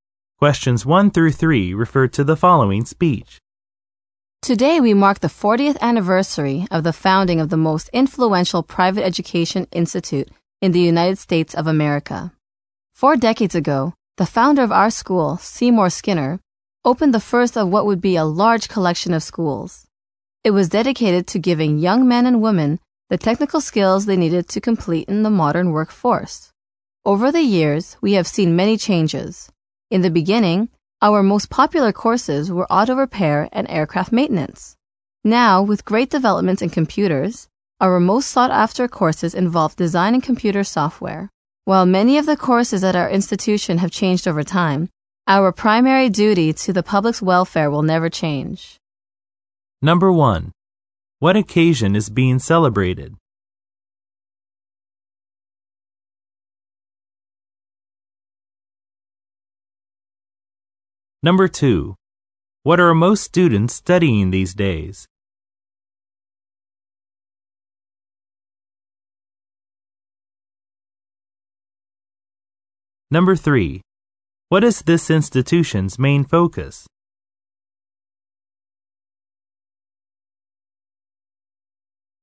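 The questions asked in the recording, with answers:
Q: What occasion is being celebrated?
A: The 40th anniversary of the school's founding

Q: What are most students studying these days?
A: Design and computer software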